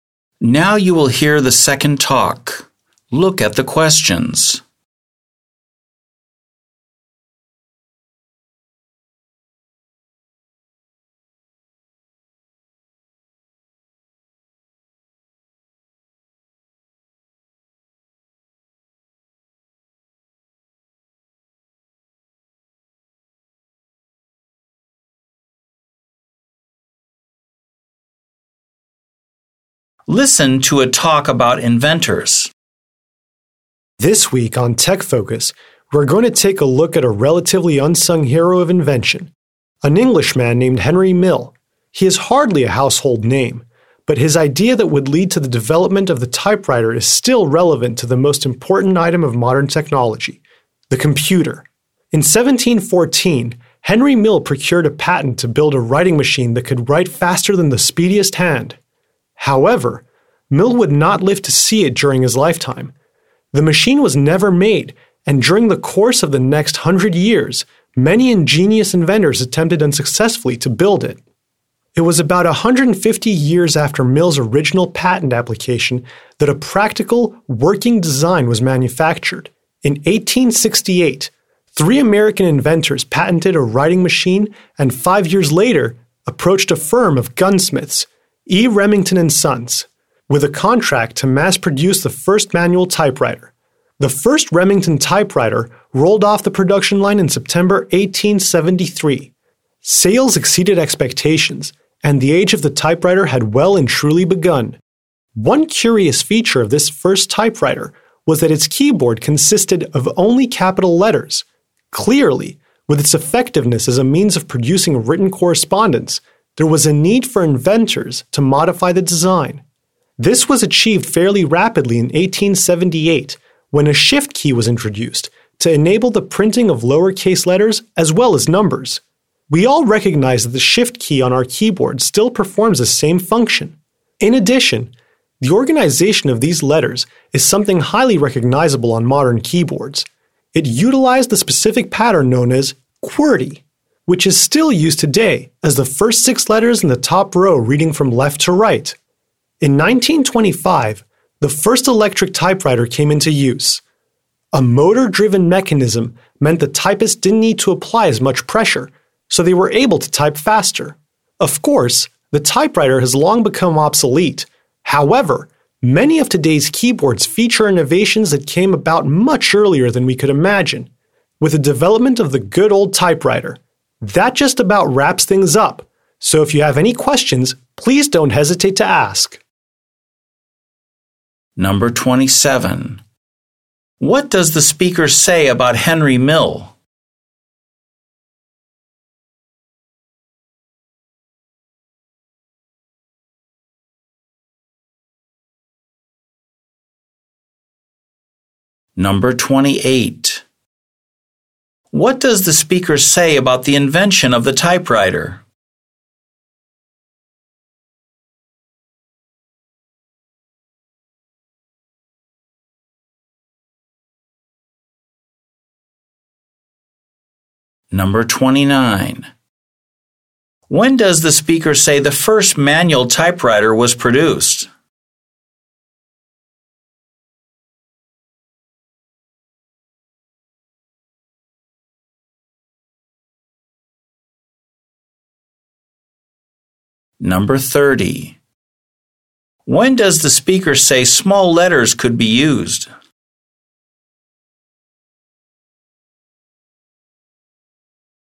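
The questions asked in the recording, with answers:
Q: When does the speaker say the first manual typewriter was produced?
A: In September 1873

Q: When does the speaker say small letters could be used?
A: In 1878, when the shift key was introduced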